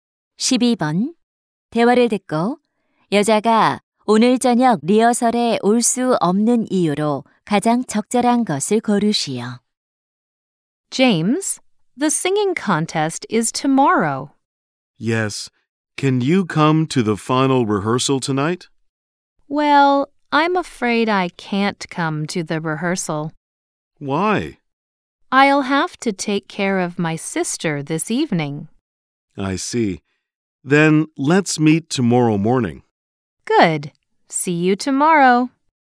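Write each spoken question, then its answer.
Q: 대화를 듣고 여자가 오늘 저녁 리허설에 올 수 없는 이유로 가장 적절한 것을 고르시오.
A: 여동생을 돌봐야 해서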